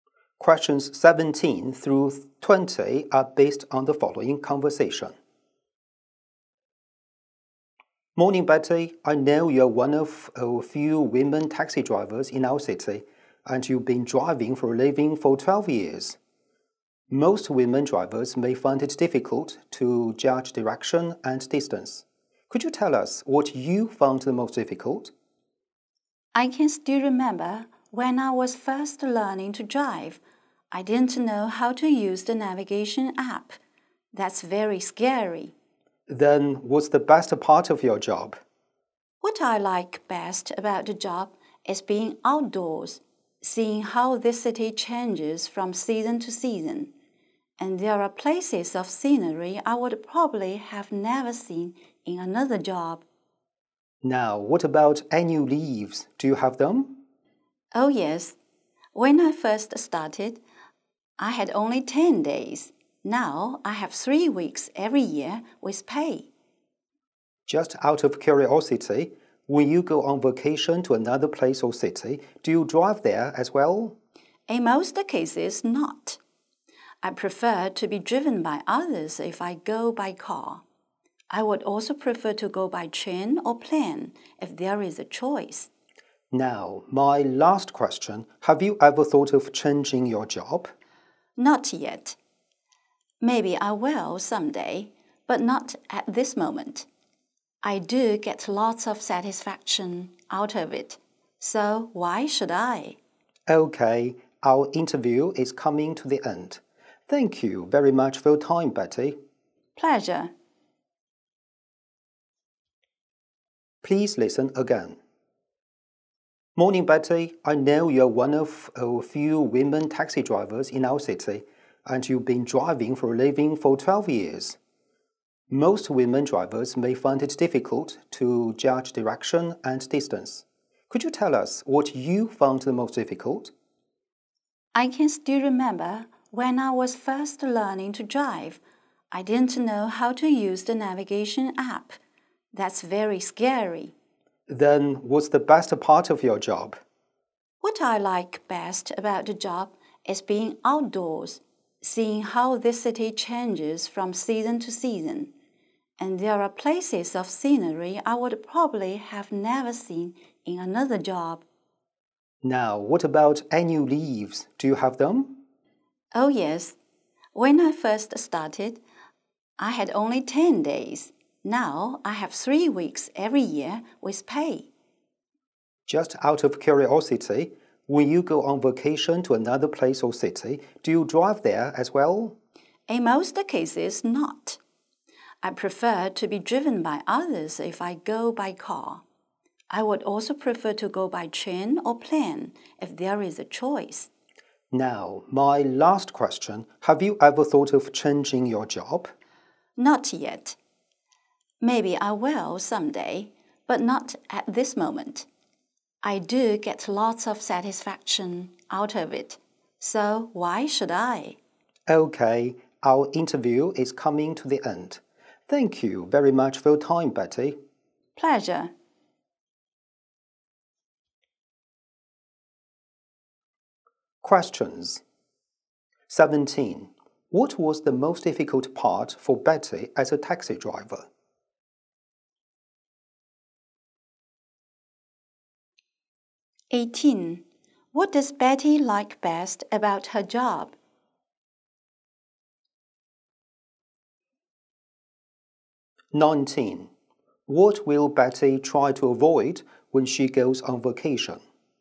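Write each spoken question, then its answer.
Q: What was the most difficult part for Betty as a taxi driver?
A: Using the navigation app

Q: What does Betty like best about her job?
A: Being outdoors and seeing the city change with the seasons

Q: What will Betty try to avoid when she goes on vacation?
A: Driving herself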